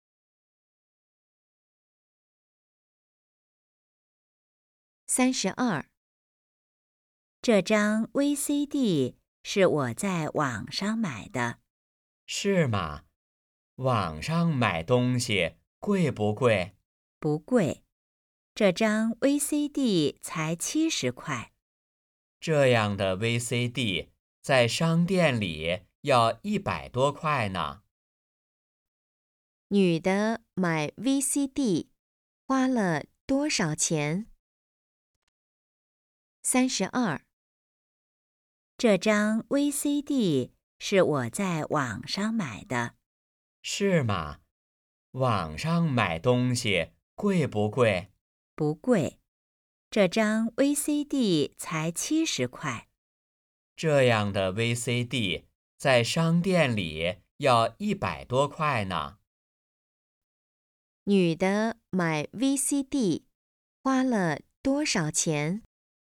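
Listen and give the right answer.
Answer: 70块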